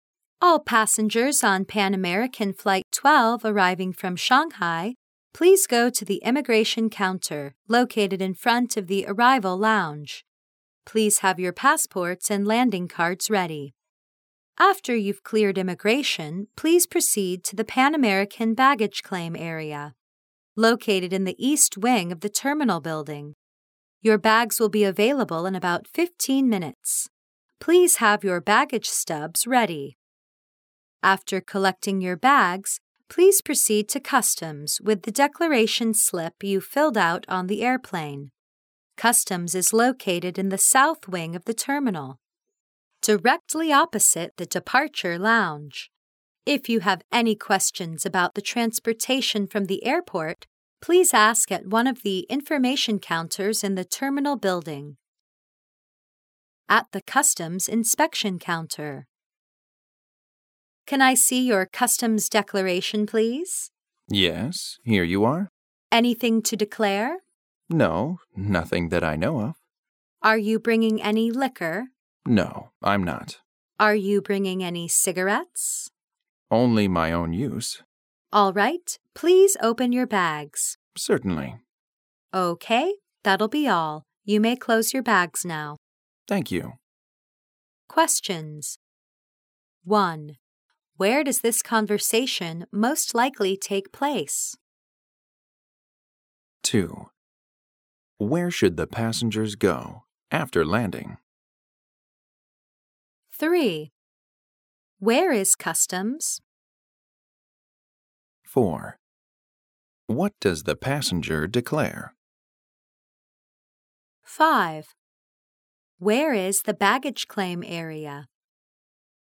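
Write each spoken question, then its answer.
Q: Where does this conversation most likely take place?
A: At an airport (customs inspection counter)

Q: Where should the passengers go after landing?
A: The immigration counter in front of the arrival lounge

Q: Where is customs?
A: In the south wing of the terminal, opposite the departure lounge

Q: What does the passenger declare?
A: Nothing

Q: Where is the baggage claim area?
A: In the east wing of the terminal building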